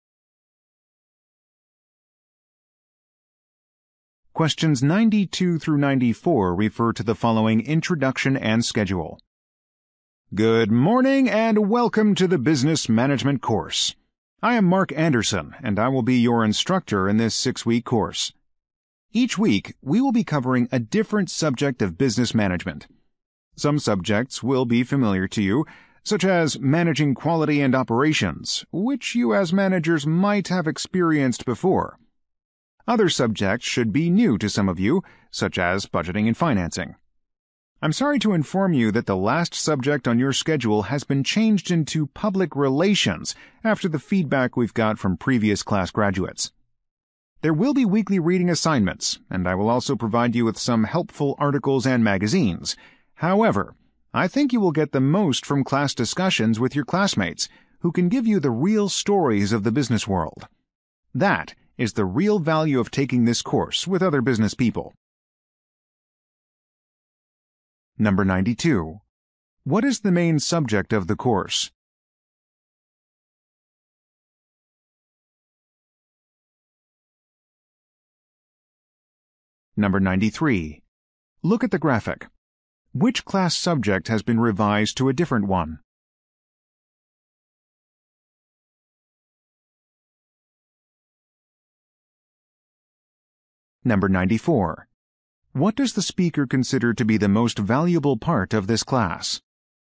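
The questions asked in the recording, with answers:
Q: What is the main subject of the course?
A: Business management

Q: What does the speaker consider to be the most valuable part of this class?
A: Class discussions with classmates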